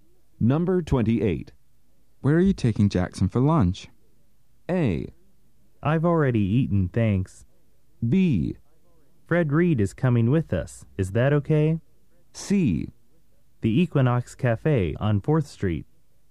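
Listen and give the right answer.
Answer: C: The Equinox Cafe on 4th Street.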